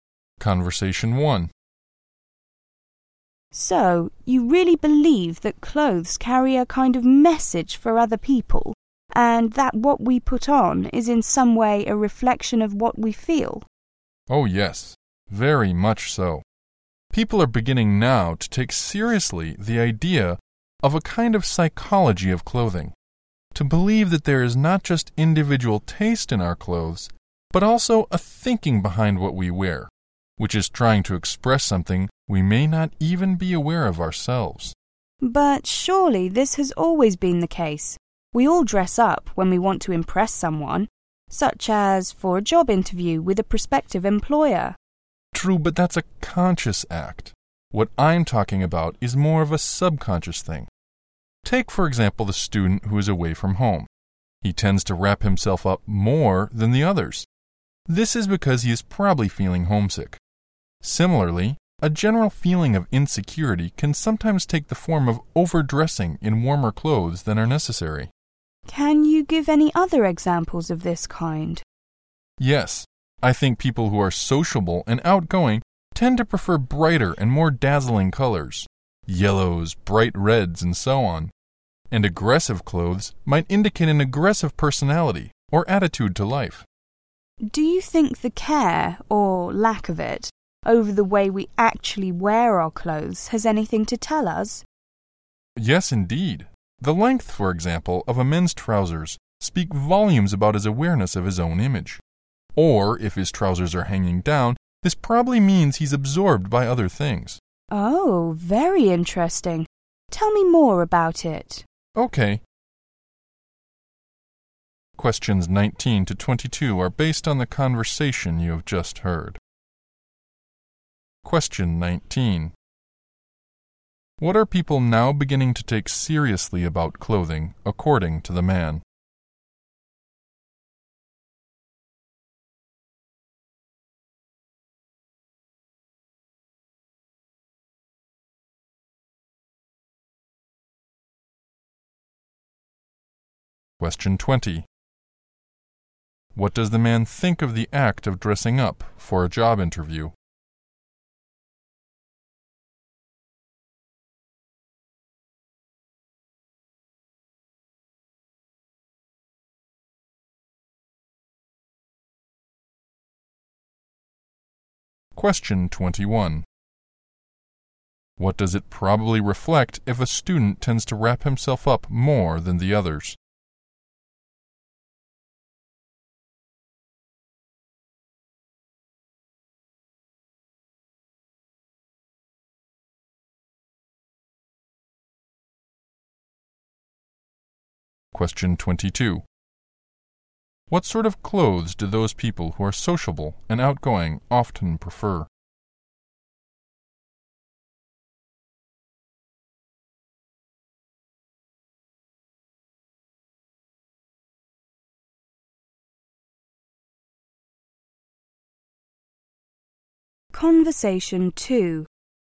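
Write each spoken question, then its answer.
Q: What are people now beginning to take seriously about clothing, according to the man?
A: The psychology of clothing

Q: What does the man think of the act of dressing up for a job interview?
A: It is a conscious act

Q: What does it probably reflect if a student tends to wrap himself up more than the others?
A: He is homesick

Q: What sort of clothes do those people who are sociable and outgoing often prefer?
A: Brightly colored clothes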